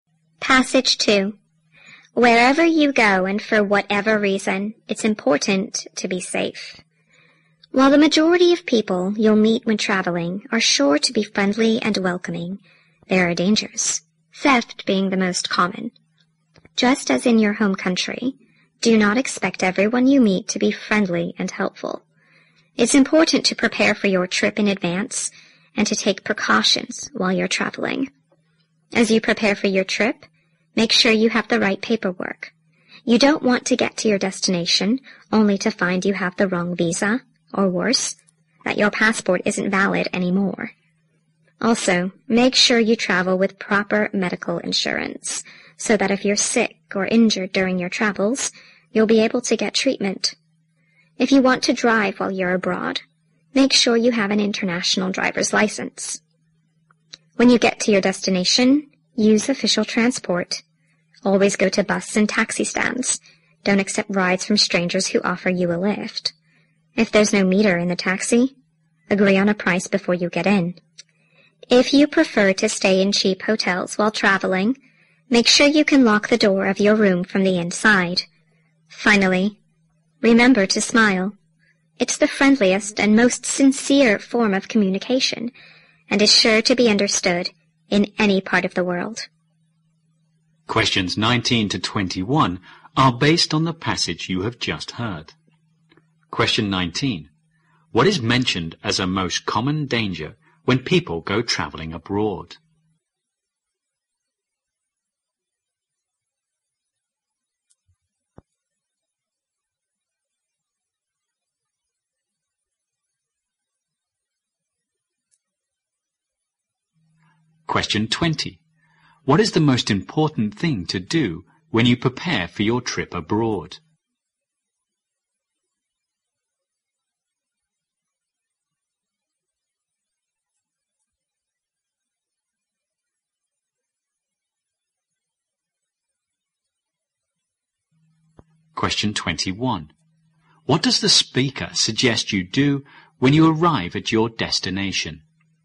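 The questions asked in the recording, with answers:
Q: What is mentioned as a most common danger when people go traveling abroad?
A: Theft.

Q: What is the most important thing to do when you prepare for your trip abroad?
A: Make sure you have the right paperwork.

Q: What does the speaker suggest you do when you arrive at your destination?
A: Use official transport.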